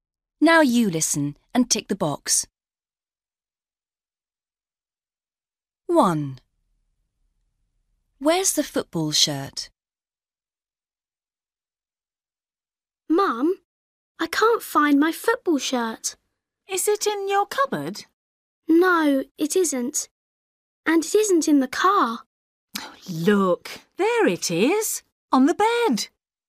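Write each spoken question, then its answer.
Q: Where's the football shirt?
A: on the bed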